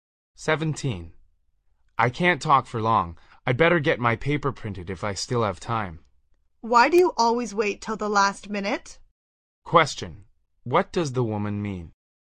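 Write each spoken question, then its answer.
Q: What does the woman mean?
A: The man always puts things off till the last minute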